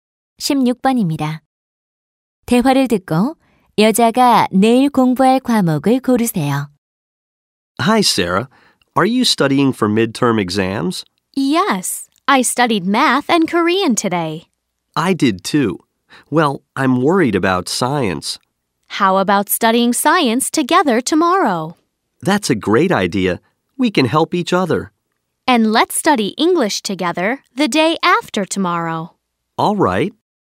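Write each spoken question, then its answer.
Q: 대화를 듣고 여자가 내일 공부할 과목을 고르세요.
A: 과학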